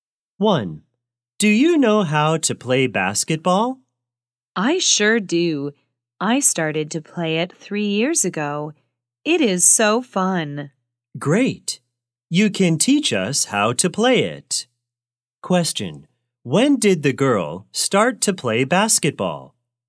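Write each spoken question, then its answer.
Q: When did the girl start to play basketball?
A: 3 years ago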